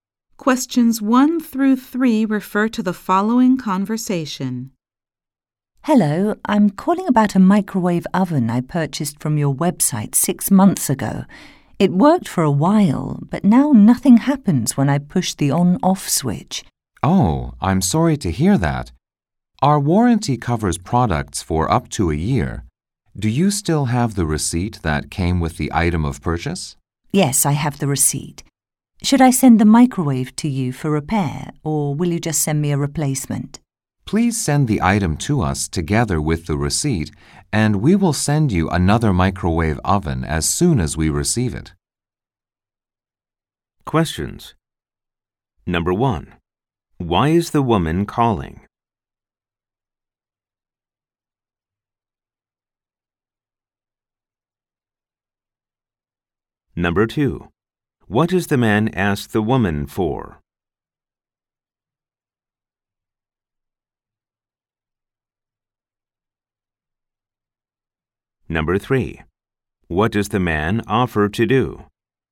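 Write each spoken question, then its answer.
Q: Why is the woman calling?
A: Her microwave oven, bought from the website 6 months ago, has stopped working

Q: What does the man ask the woman for?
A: The receipt

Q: What does the man offer to do?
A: Send her a replacement microwave oven once they receive the broken one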